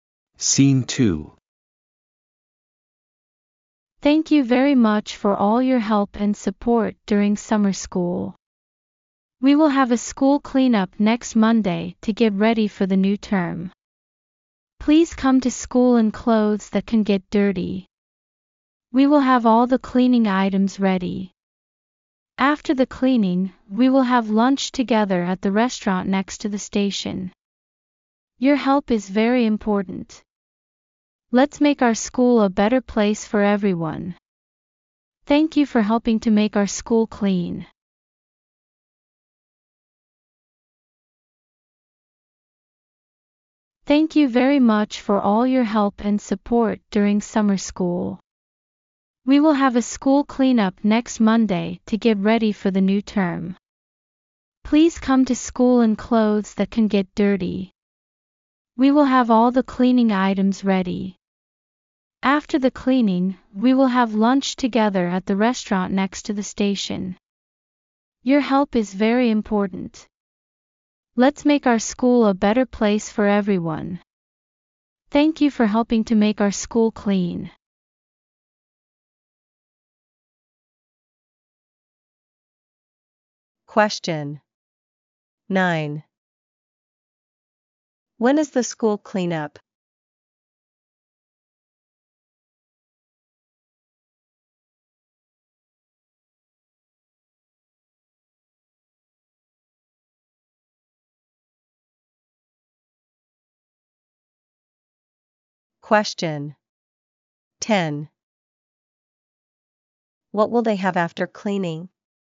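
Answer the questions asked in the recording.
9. Next Monday
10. Lunch together at the restaurant next to the station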